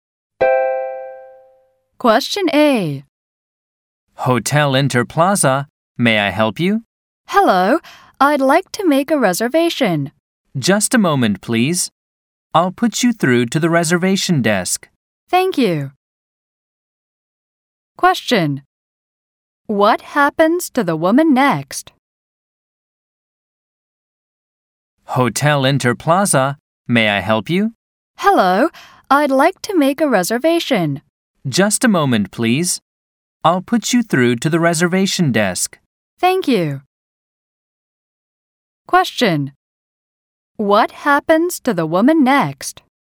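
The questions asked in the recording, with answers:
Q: What happens to the woman next?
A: She is transferred to the reservation desk.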